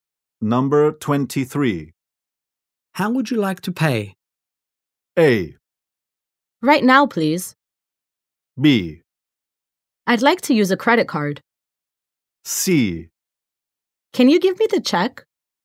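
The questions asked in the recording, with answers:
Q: How would you like to pay?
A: B: I'd like to use a credit card.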